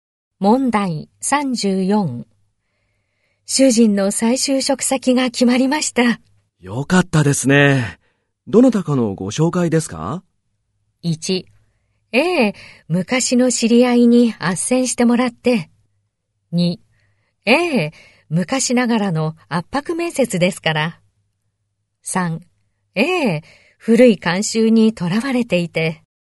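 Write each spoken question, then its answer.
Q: 主人の再就職先が決まりました。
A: 1: ええ、昔の知り合いに斡旋してもらって。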